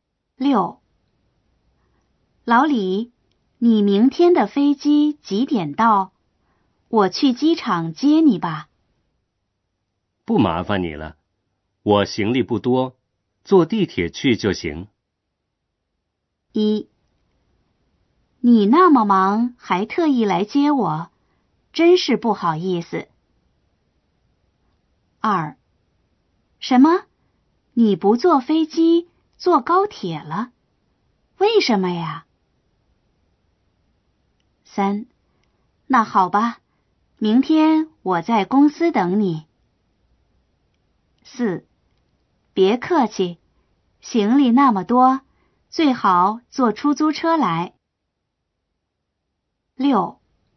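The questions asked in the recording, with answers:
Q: 不麻烦你了,我行李不多,坐地铁去就行。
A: 3: 那好吧,明天我在公司等你。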